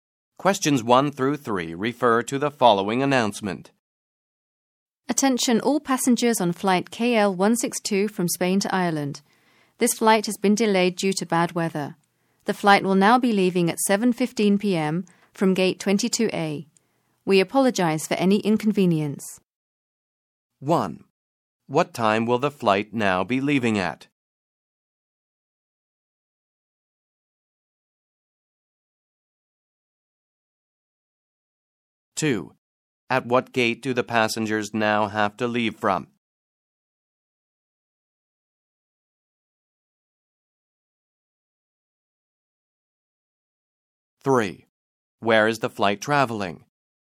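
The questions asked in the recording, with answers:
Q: What time will the flight now be leaving at?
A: 7:15 p.m.

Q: At what gate do the passengers now have to leave from?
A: Gate 22A

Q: Where is the flight traveling?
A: From Spain to Ireland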